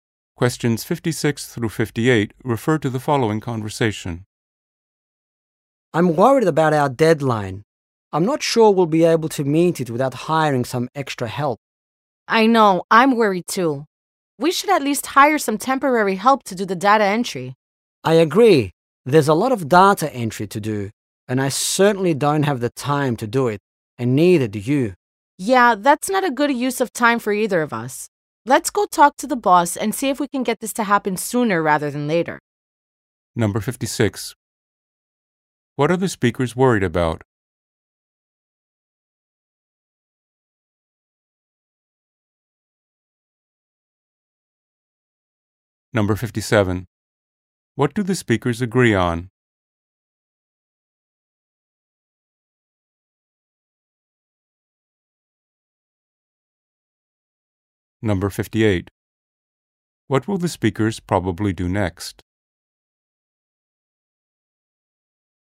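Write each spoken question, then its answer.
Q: What are the speakers worried about?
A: Meeting their deadline

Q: What do the speakers agree on?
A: Hiring temporary help for data entry

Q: What will the speakers probably do next?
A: Talk to the boss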